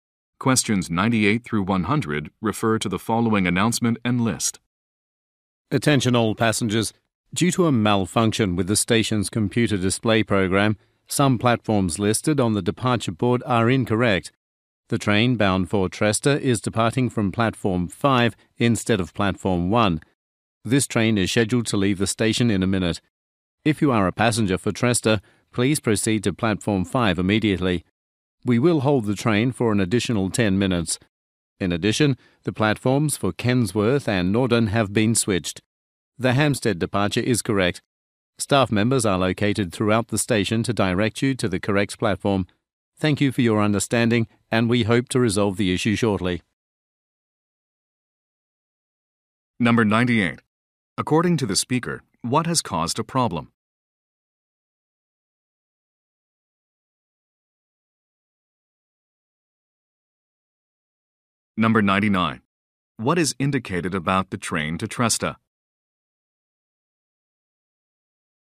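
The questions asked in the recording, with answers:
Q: According to the speaker, what has caused a problem?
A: A malfunction with the station's computer display program

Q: What is indicated about the train to Tresta?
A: It departs from Platform 5 and will be held for 10 more minutes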